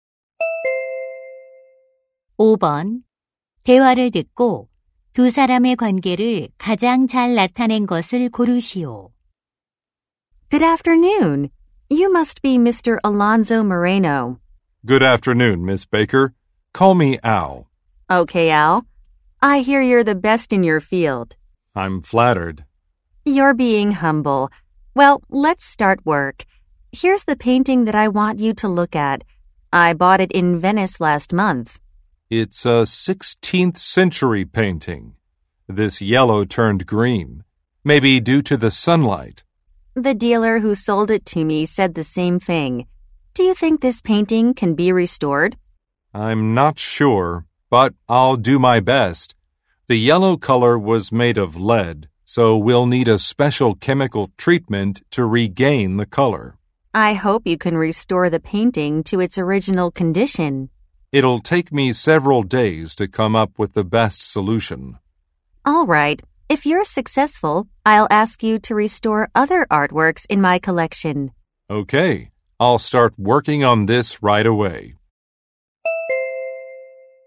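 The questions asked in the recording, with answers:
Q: 대화를 듣고 두 사람의 관계를 가장 잘 나타낸 것을 고르시오.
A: 미술품 소장가 – 미술품 복원가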